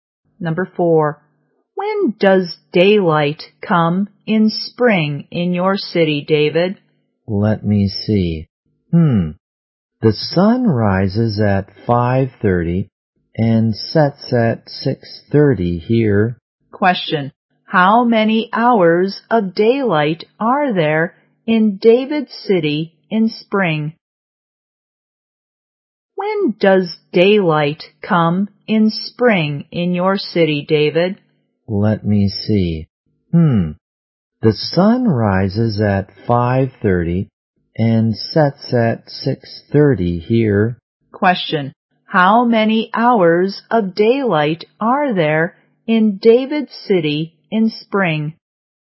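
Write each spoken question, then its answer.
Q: Question.How many hours of daylight are there in David City in spring?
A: 13 hours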